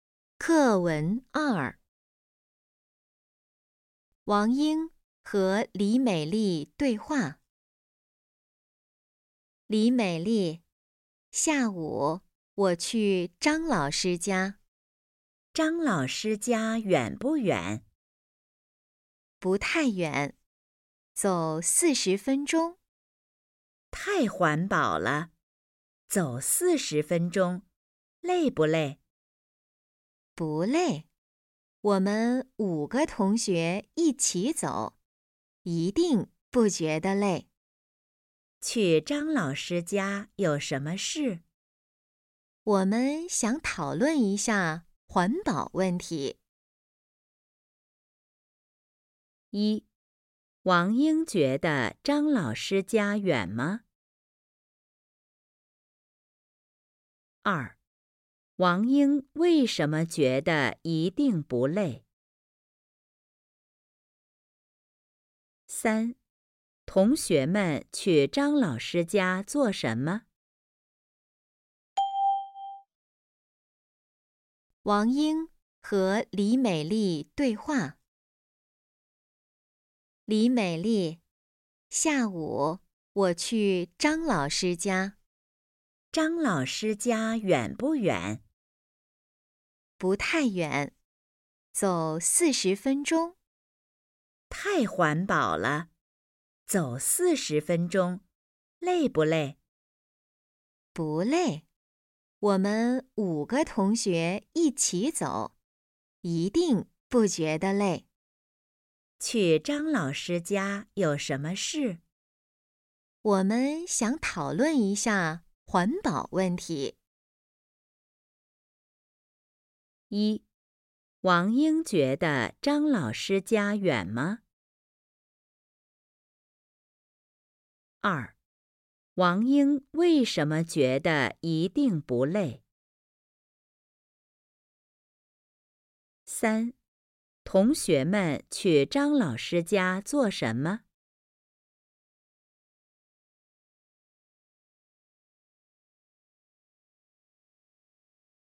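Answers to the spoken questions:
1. 不太远
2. 五个同学一起走
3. 讨论环保问题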